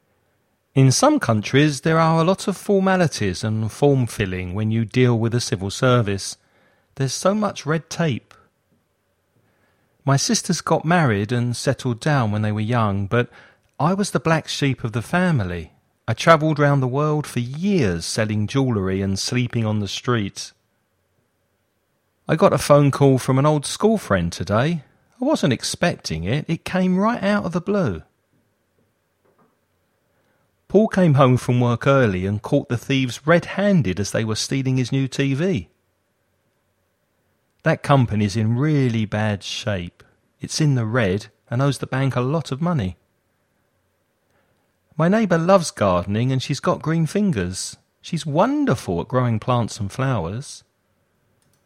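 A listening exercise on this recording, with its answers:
Choose the correct colour idiom to complete the sentences.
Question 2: My sisters got married and settled down when they were young, but I was the of the family. I travelled around the world for years selling jewellery and sleeping in the street.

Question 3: I got a phone call from an old school friend today. I wasn't expecting it. It came right .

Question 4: Paul came home from work early and caught the thieves as they were stealing his new TV.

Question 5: That company is in really bad shape. It's and owes the bank a lot of money.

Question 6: My neighbour loves gardening and she's got . She's wonderful at growing plants and flowers.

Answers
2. black sheep
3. out of the blue
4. red-handed
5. in the red
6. green fingers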